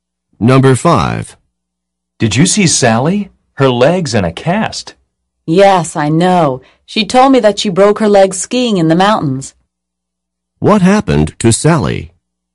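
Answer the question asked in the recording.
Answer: She broke her leg skiing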